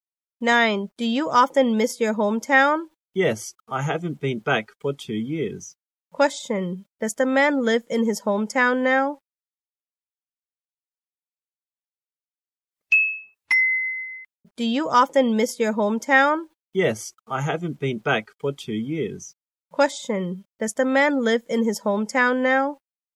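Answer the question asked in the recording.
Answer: No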